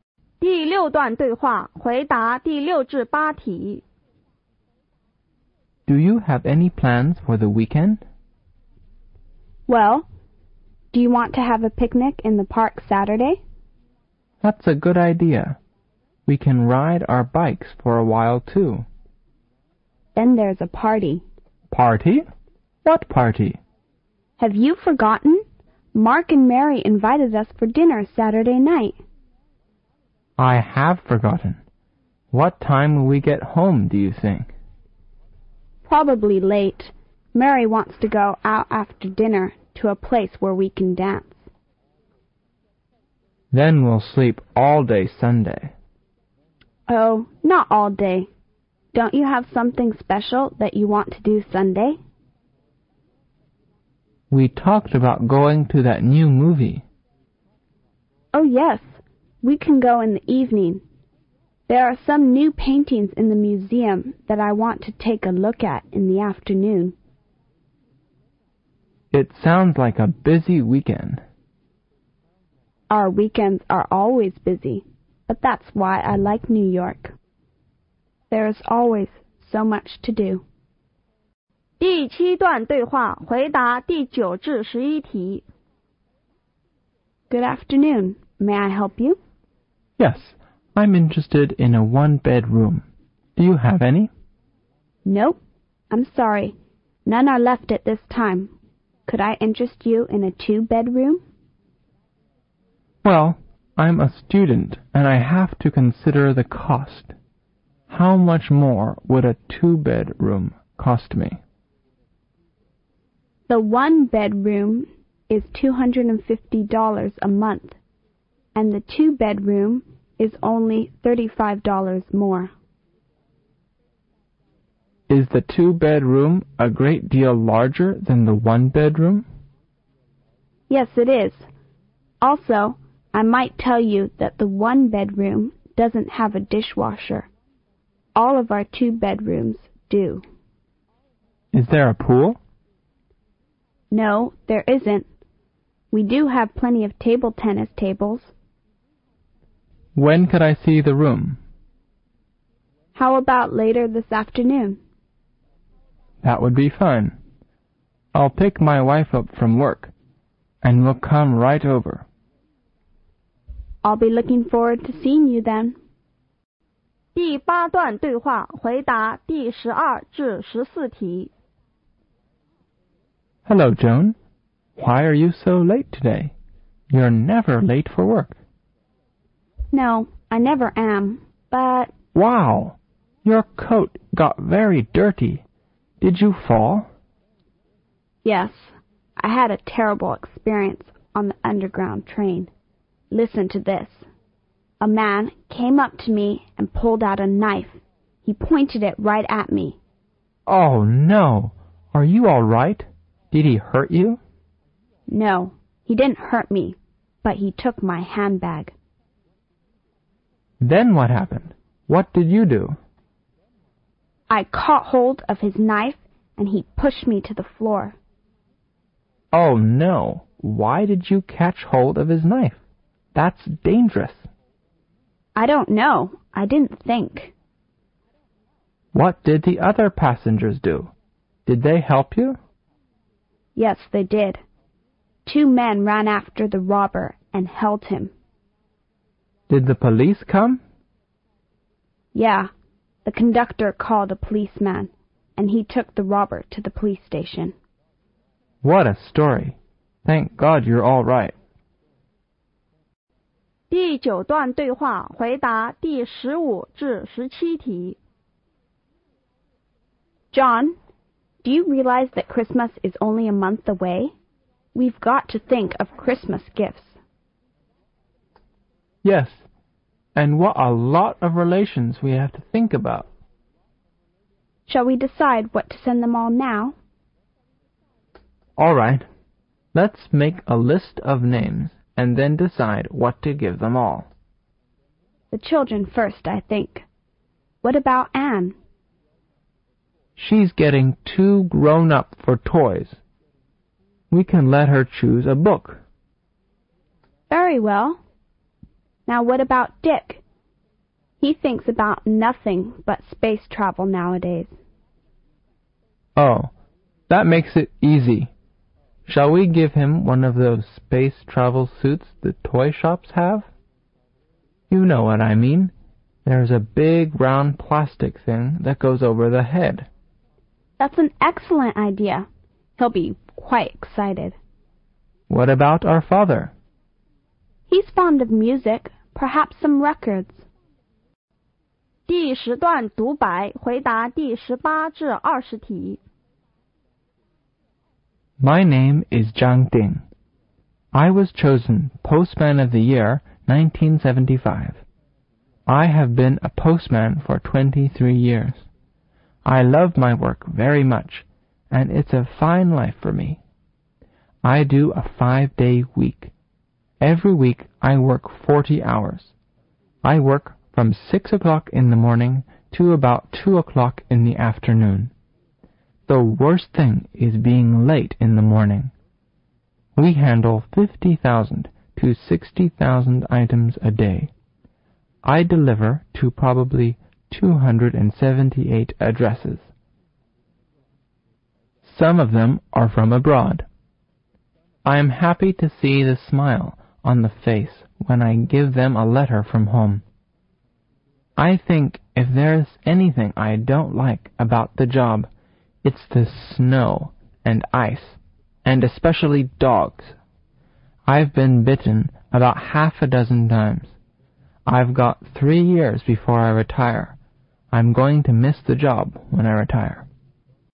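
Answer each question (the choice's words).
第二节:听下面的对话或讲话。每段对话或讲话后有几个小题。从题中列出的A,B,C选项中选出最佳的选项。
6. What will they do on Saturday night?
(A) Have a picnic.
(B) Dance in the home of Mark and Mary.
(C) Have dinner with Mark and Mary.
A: Have dinner with Mark and Mary.

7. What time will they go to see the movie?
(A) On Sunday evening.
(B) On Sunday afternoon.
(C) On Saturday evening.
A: On Sunday evening.

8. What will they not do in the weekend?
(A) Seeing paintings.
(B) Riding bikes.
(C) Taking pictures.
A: Taking pictures.

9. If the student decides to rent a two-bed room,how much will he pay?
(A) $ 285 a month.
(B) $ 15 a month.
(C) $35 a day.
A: $ 285 a month.

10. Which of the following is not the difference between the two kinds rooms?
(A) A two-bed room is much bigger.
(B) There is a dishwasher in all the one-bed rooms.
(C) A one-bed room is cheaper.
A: There is a dishwasher in all the one-bed rooms.

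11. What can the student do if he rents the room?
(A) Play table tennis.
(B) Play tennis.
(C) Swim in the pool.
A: Play table tennis.

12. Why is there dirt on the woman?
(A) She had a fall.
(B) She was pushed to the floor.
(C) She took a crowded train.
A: She was pushed to the floor.

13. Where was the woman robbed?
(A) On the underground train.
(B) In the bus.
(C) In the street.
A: On the underground train.

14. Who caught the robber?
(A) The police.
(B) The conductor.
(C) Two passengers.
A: Two passengers.

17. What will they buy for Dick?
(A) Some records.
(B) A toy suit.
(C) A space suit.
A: A space suit.

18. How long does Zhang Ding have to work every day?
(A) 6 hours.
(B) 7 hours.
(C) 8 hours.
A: 8 hours.

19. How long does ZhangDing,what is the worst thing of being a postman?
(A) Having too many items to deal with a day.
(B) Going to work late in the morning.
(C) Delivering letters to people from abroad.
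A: Going to work late in the morning.

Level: 高考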